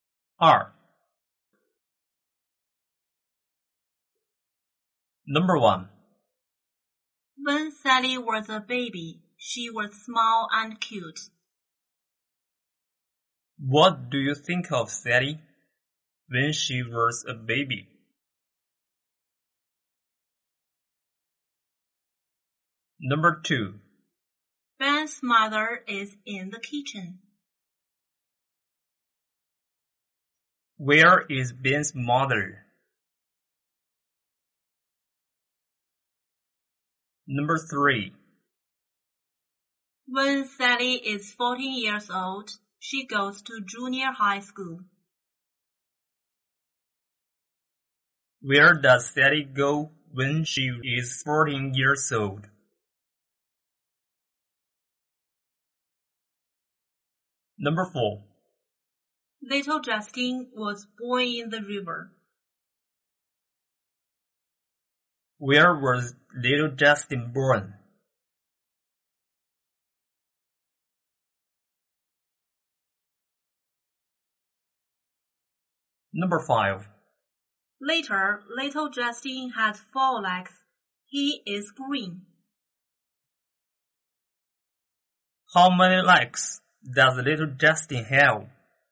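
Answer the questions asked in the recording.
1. She was small and cute.
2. In the kitchen.
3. Junior high school.
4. In the river.
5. Four.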